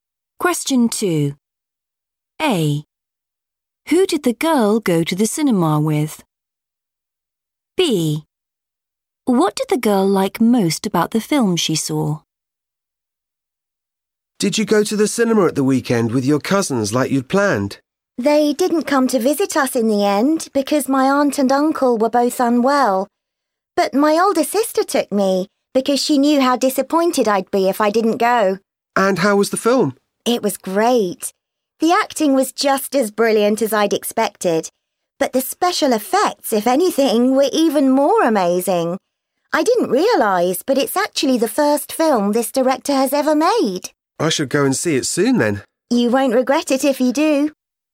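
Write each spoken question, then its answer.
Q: Who did the girl go to the cinema with?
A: her older sister

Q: What did the girl like most about the film she saw?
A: the special effects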